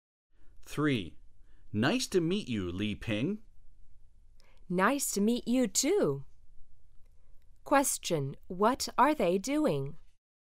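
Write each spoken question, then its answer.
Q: What are they doing?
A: Meeting each other for the first time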